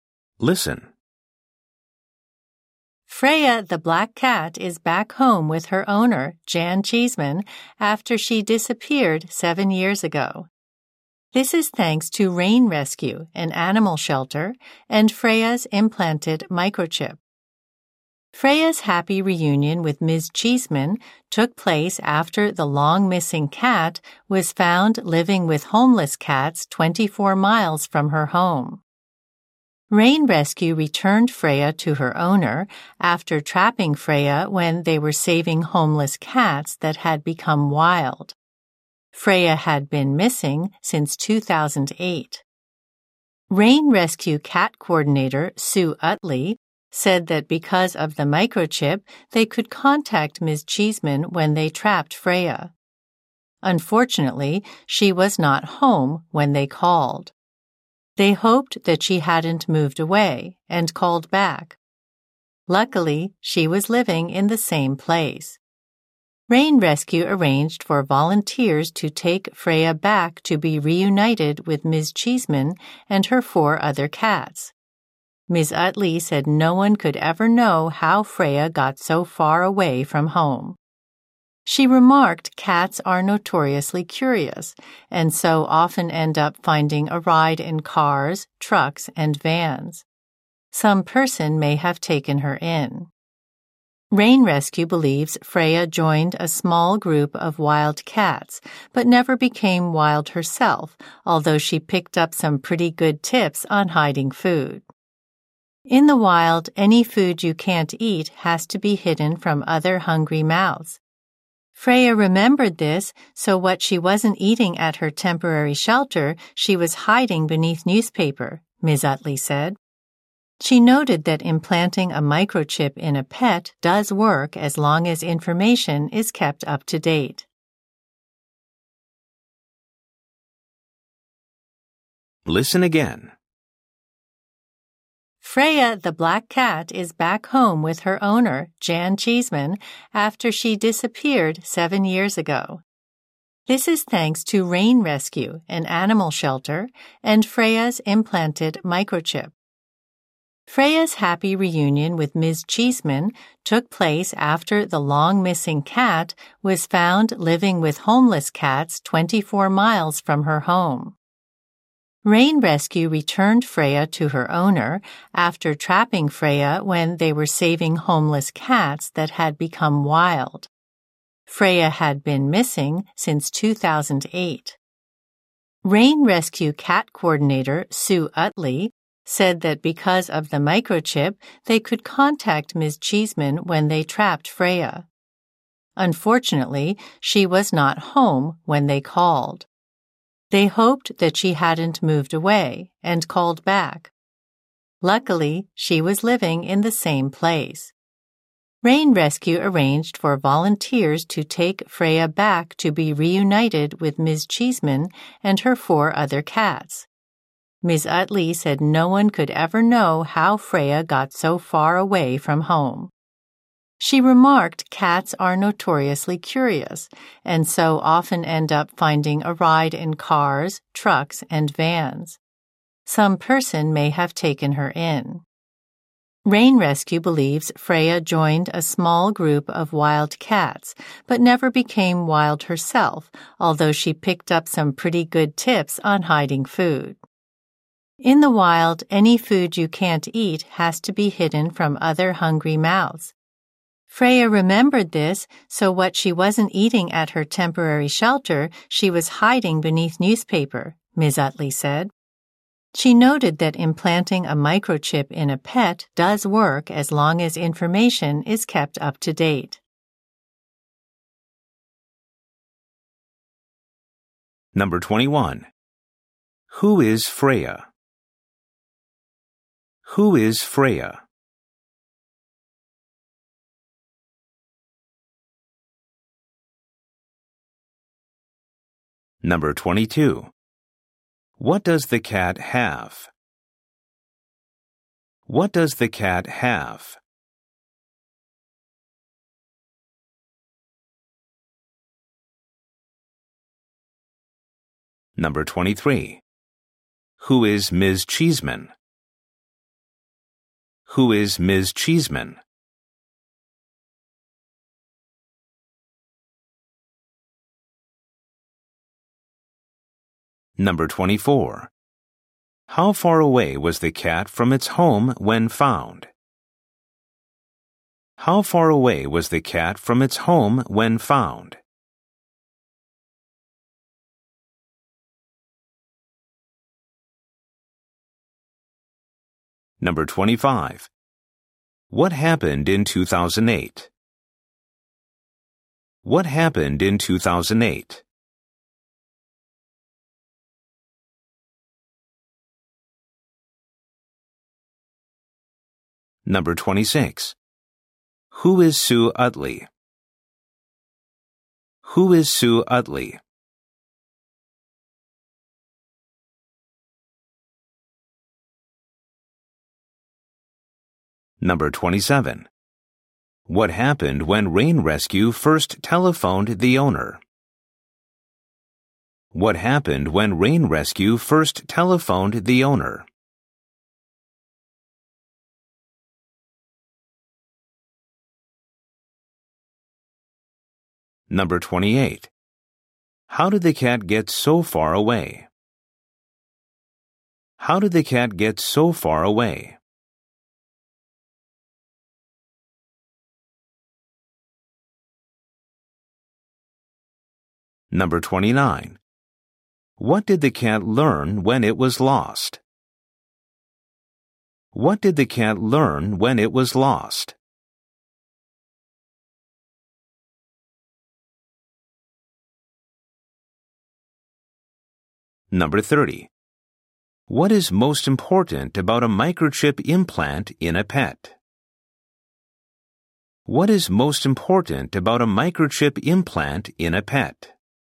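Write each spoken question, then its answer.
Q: Who is Freya?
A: A black cat

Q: What does the cat have?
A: An implanted microchip

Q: Who is Ms. Cheeseman?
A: Freya's owner

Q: How far away was the cat from its home when found?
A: 24 miles

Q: What happened in 2008?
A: Freya went missing

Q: Who is Sue Utley?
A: Rain Rescue's cat coordinator

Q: What happened when Rain Rescue first telephoned the owner?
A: She was not home

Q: How did the cat get so far away?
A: No one knows; maybe it rode in a vehicle

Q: What did the cat learn when it was lost?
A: How to hide food

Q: What is most important about a microchip implant in a pet?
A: Keeping the information up to date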